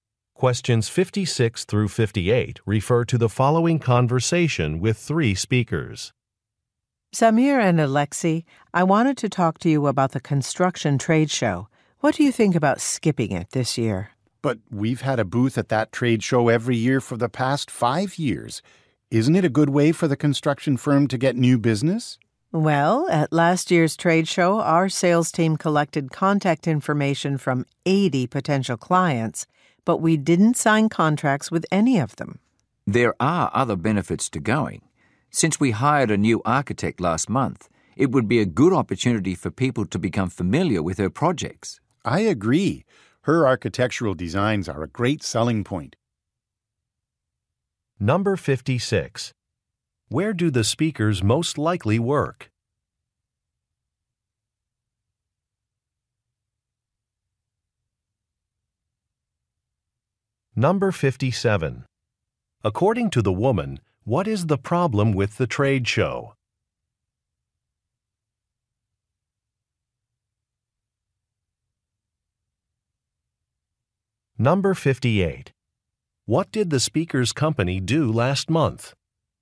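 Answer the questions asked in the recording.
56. At a construction firm.
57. It did not produce any contracts.
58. Hired a new architect.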